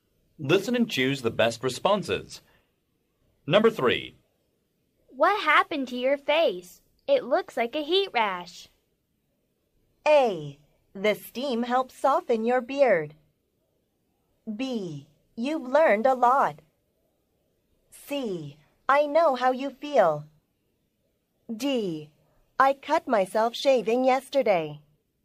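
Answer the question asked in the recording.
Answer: D: I cut myself shaving yesterday.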